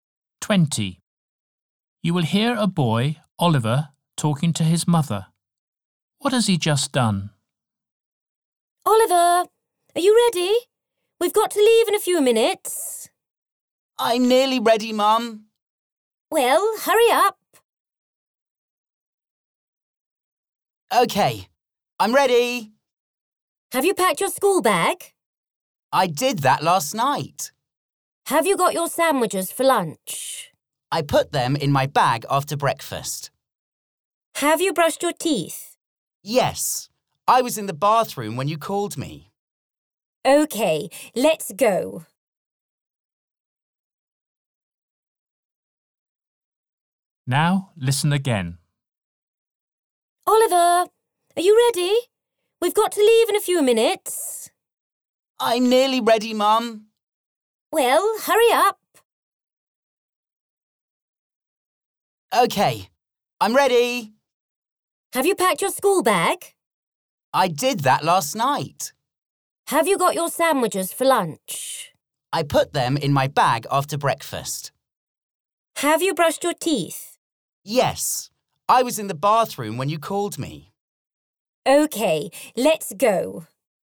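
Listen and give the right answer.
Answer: Brushed his teeth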